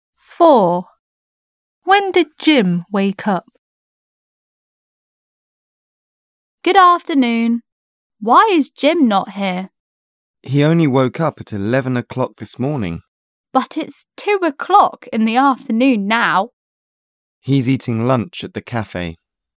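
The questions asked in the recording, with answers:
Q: When did Jim wake up?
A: At 11 o'clock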